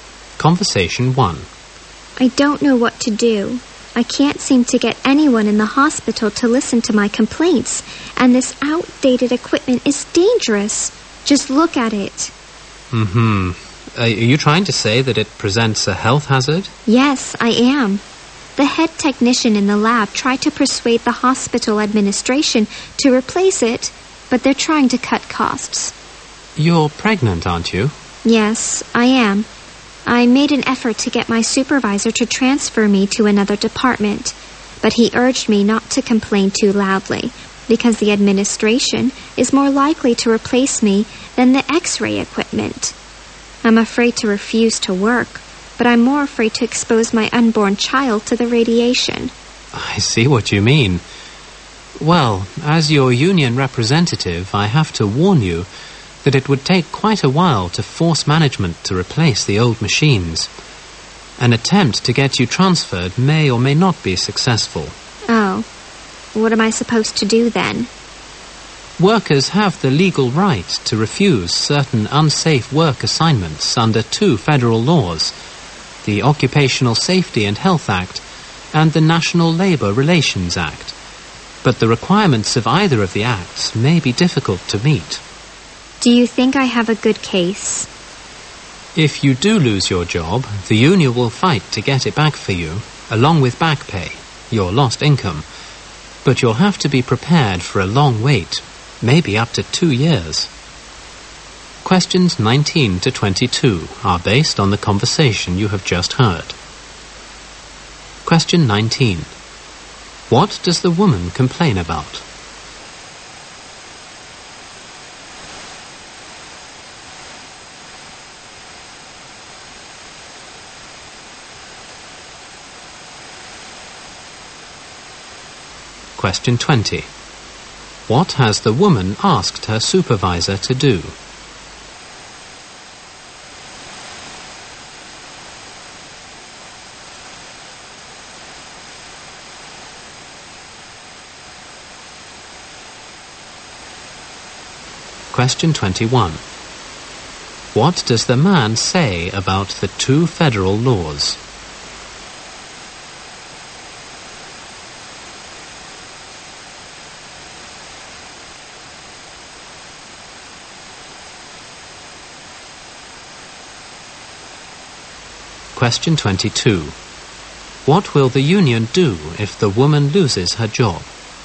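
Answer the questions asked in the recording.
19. The hospital's outdated X-ray equipment is dangerous.
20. Transfer her to another department.
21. Their requirements may be difficult to meet.
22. Fight to get her job back, with back pay.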